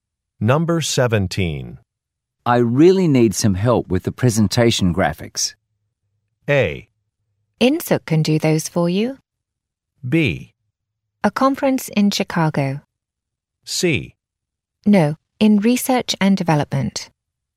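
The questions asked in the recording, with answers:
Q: I really need some help with the presentation graphics.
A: A: Insook can do those for you.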